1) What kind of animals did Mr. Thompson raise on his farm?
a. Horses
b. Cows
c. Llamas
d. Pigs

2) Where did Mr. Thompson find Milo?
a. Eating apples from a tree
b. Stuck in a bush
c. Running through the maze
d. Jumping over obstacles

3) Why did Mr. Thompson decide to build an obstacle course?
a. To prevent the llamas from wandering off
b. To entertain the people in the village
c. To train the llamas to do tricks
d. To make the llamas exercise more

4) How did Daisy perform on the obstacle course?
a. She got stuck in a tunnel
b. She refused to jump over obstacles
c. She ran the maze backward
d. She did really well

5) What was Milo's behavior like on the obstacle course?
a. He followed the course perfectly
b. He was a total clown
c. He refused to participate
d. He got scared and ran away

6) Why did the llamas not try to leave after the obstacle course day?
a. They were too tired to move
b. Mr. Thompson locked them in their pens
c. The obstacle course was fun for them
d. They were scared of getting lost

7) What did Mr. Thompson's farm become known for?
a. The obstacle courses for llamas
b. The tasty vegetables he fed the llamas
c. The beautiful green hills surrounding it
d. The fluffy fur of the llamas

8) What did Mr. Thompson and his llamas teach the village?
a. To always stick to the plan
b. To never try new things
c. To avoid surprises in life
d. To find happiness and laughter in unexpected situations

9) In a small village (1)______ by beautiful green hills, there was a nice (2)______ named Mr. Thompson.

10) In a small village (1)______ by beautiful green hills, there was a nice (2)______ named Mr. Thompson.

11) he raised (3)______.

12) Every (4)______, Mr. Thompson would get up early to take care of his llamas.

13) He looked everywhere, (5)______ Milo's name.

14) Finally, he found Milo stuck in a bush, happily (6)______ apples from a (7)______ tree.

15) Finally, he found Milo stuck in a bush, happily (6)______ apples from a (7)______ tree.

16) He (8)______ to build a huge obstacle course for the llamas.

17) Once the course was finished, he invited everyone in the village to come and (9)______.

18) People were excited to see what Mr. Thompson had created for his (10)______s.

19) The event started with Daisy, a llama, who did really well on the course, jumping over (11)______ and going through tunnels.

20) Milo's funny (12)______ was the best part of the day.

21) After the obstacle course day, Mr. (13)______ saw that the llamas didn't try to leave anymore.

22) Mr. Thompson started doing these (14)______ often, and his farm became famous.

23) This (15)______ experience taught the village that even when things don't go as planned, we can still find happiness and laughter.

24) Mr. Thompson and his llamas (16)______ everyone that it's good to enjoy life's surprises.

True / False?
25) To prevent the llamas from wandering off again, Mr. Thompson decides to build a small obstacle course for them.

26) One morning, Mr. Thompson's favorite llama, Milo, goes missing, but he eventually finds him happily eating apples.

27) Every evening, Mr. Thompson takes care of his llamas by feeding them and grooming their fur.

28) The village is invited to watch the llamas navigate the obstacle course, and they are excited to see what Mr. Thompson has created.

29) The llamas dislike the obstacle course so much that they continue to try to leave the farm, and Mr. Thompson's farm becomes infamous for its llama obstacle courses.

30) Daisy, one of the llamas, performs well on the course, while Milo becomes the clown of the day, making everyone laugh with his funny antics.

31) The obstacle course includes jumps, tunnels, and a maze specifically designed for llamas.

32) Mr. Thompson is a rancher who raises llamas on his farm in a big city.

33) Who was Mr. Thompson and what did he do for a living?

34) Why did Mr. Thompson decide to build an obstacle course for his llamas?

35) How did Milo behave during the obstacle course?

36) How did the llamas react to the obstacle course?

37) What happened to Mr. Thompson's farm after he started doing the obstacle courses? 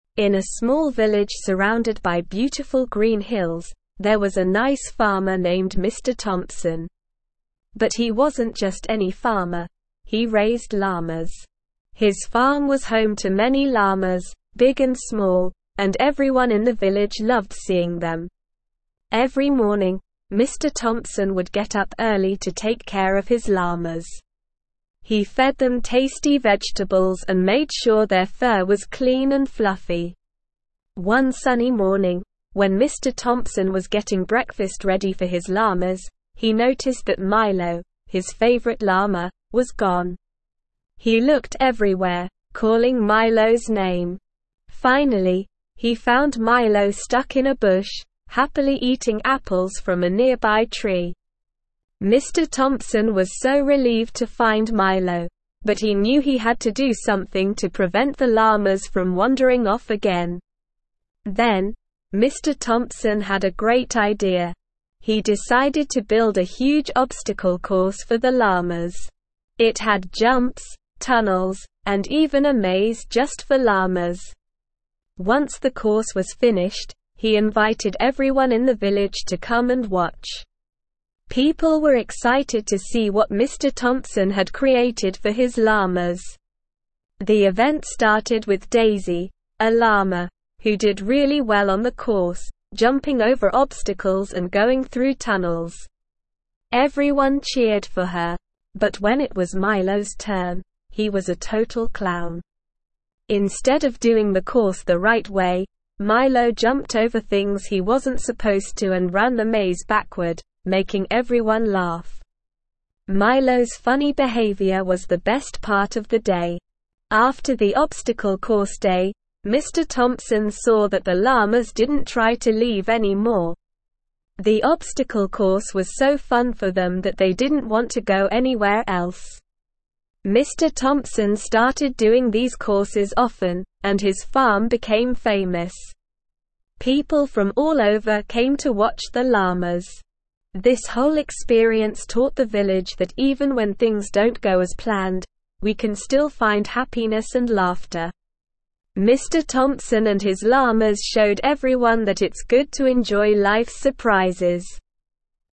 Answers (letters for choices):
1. c
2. b
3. a
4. d
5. b
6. c
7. a
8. d
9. surrounded
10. farmer
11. llamas
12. morning
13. calling
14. eating
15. nearby
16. decided
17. watch
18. llama
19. obstacles
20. behavior
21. Thompson
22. courses
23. whole
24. showed
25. False
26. True
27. False
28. True
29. False
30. True
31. True
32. False
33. Mr. Thompson was a farmer who raised llamas.
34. Mr. Thompson wanted to prevent his llamas from wandering off, so he built the obstacle course to keep them entertained and busy.
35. Milo was a total clown and didn't follow the course properly. He jumped over things he wasn't supposed to and ran the maze backward, making everyone laugh.
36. The llamas enjoyed the obstacle course and didn't try to leave anymore. They found it so fun that they didn't want to go anywhere else.
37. Mr. Thompson's farm became famous, and people from all over came to watch the llamas on the obstacle course.

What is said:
In a small village surrounded by beautiful green hills, there was a nice farmer named Mr. Thompson. But he wasn't just any farmer; he raised llamas. His farm was home to many llamas, big and small, and everyone in the village loved seeing them. Every morning, Mr. Thompson would get up early to take care of his llamas. He fed them tasty vegetables and made sure their fur was clean and fluffy.
One sunny morning, when Mr. Thompson was getting breakfast ready for his llamas, he noticed that Milo, his favorite llama, was gone! He looked everywhere, calling Milo's name. Finally, he found Milo stuck in a bush, happily eating apples from a nearby tree. Mr. Thompson was so relieved to find Milo, but he knew he had to do something to prevent the llamas from wandering off again.
Then, Mr. Thompson had a great idea. He decided to build a huge obstacle course for the llamas. It had jumps, tunnels, and even a maze just for llamas. Once the course was finished, he invited everyone in the village to come and watch. People were excited to see what Mr. Thompson had created for his llamas.
The event started with Daisy, a llama, who did really well on the course, jumping over obstacles and going through tunnels. Everyone cheered for her. But when it was Milo's turn, he was a total clown. Instead of doing the course the right way, Milo jumped over things he wasn't supposed to and ran the maze backward, making everyone laugh. Milo's funny behavior was the best part of the day.
After the obstacle course day, Mr. Thompson saw that the llamas didn't try to leave anymore. The obstacle course was so fun for them that they didn't want to go anywhere else. Mr. Thompson started doing these courses often, and his farm became famous. People from all over came to watch the llamas. This whole experience taught the village that even when things don't go as planned, we can still find happiness and laughter. Mr. Thompson and his llamas showed everyone that it's good to enjoy life's surprises.

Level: Level 3